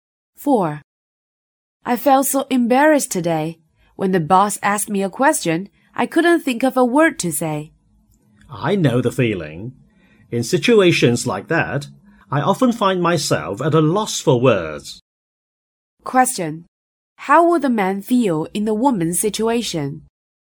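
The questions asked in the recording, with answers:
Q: How would the man feel in the woman's situation?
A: He would also be at a loss for words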